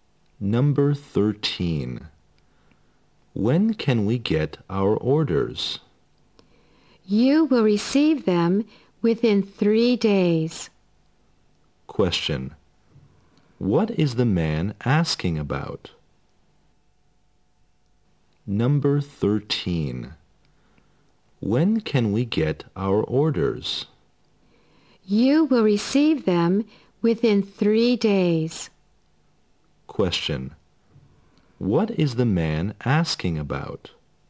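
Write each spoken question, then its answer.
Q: What is the man asking about?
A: When they can get their orders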